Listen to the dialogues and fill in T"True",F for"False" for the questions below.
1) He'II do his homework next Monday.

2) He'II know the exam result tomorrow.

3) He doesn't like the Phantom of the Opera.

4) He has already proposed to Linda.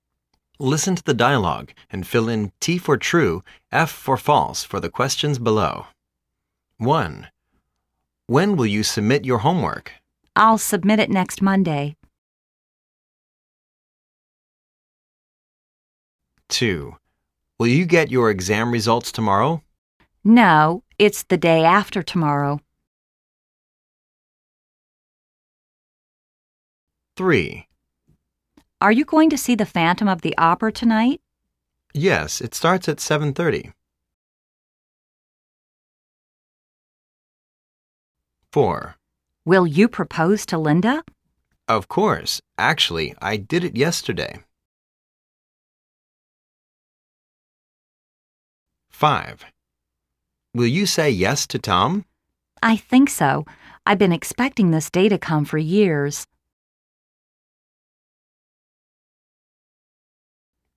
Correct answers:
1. False
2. False
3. False
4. True